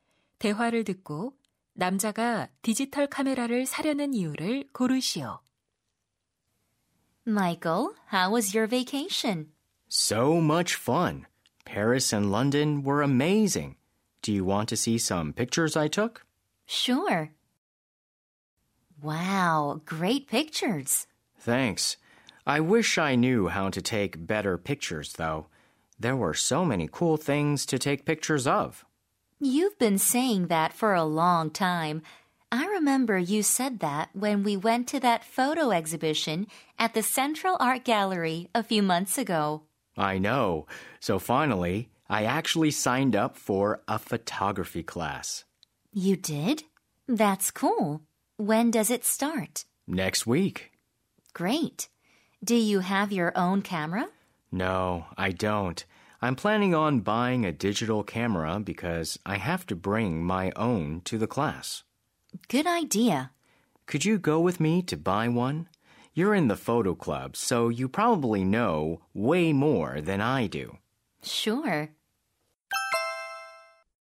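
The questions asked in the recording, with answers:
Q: 대화를 듣고 남자가 디지털 카메라를 사려는 이유를 고르시오.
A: 사진 수업에 자신의 카메라를 가져가야 해서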